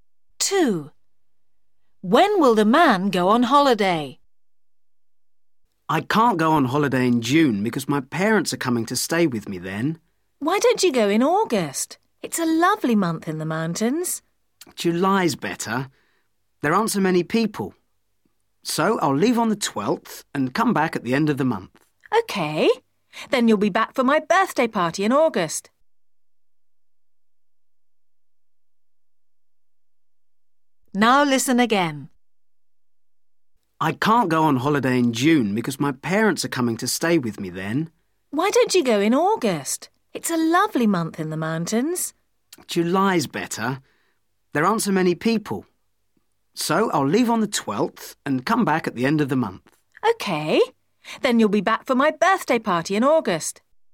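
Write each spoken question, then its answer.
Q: When will the man go on holiday?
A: July (the 12th)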